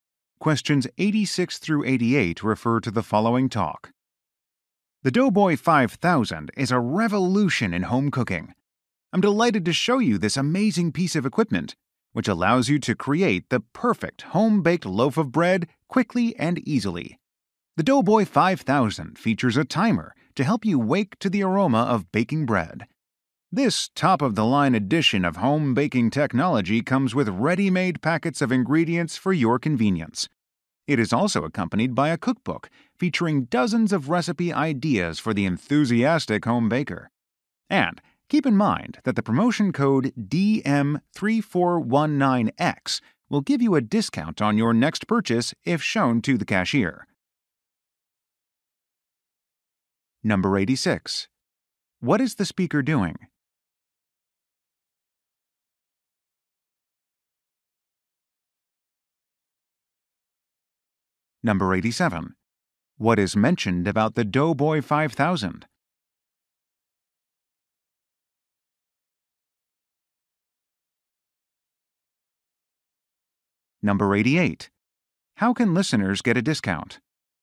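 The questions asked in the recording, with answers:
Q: What is the speaker doing?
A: Demonstrating a bread-making machine

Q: What is mentioned about the Doughboy 5000?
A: It has a timer and comes with ingredient packets and a cookbook

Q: How can listeners get a discount?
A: By showing a promotion code to the cashier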